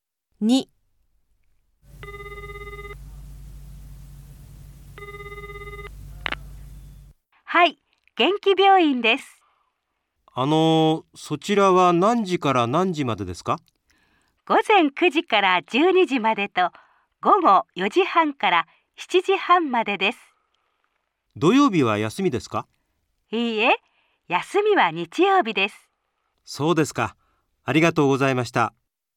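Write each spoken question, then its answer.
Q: 何時から何時までですか?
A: 午前9時から12時までと午後4時半から7時半まで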